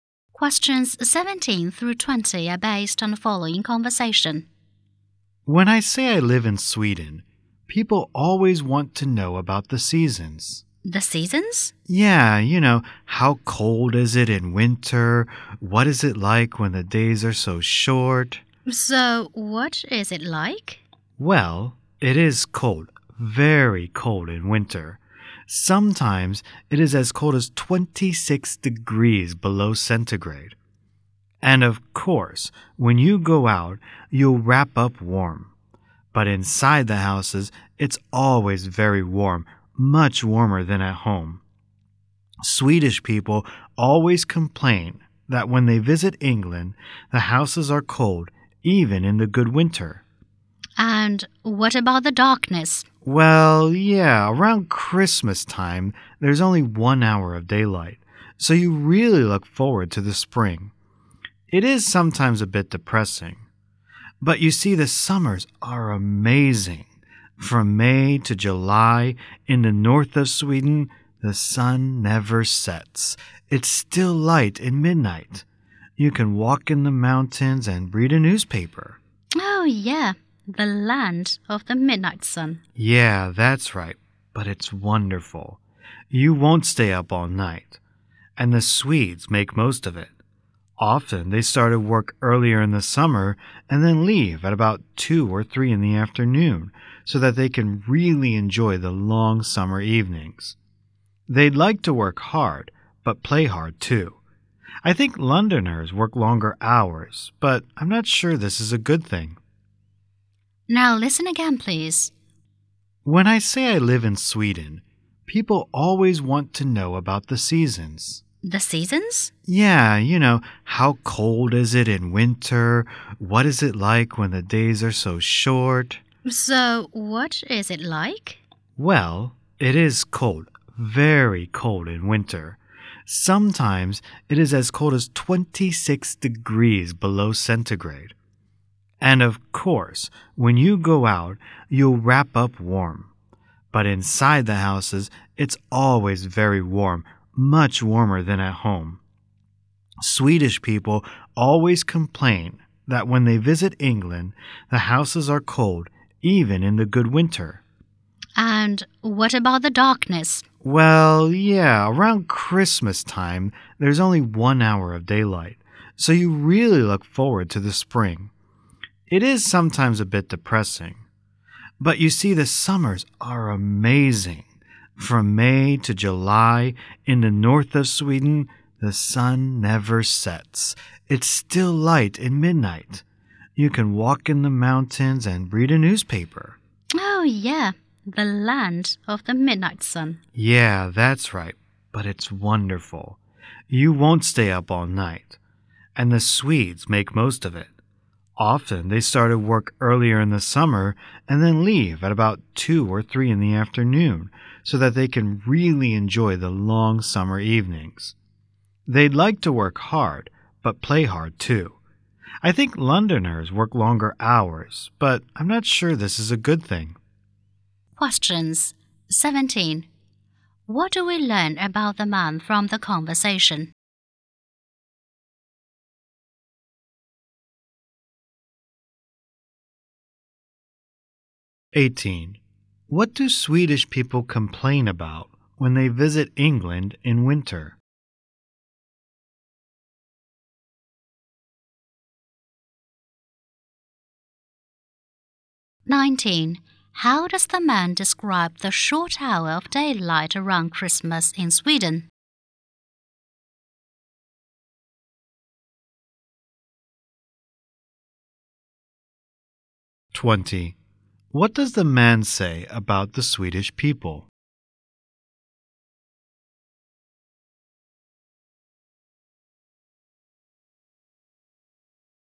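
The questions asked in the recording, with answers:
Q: What do Swedish people complain about when they visit England in winter?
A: The houses are cold

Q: How does the man describe the short hour of daylight around Christmas in Sweden?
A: Sometimes a bit depressing

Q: What does the man say about the Swedish people?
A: They work hard but play hard too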